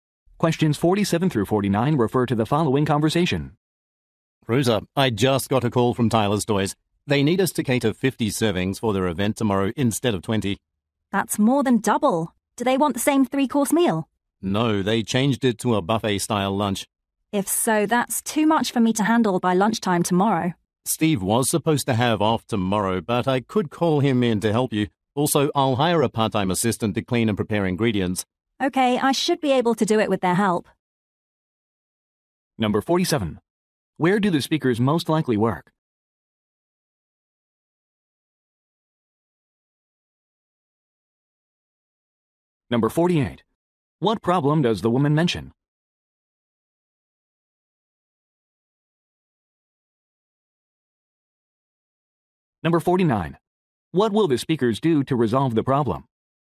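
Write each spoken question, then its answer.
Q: Where do the speakers most likely work?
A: At a catering company

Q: What will the speakers do to resolve the problem?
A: Call Steve in and hire a part-time assistant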